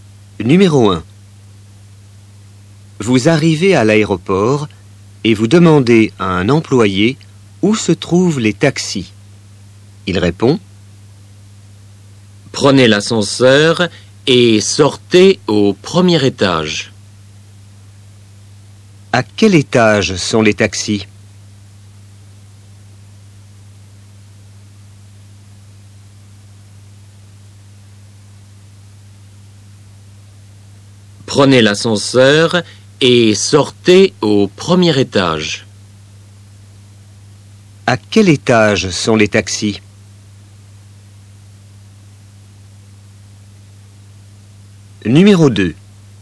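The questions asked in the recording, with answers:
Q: À quel étage sont les taxis?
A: au premier étage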